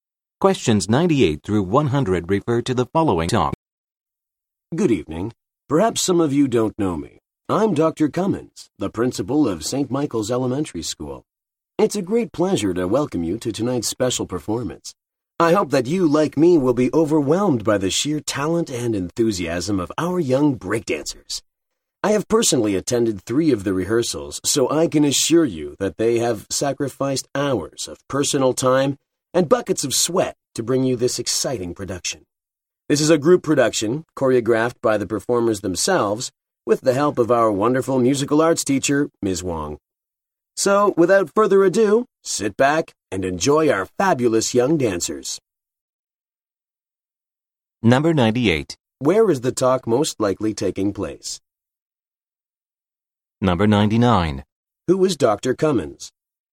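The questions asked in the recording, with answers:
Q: Where is the talk most likely taking place?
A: At an elementary school

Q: Who is Dr. Cummins?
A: The school principal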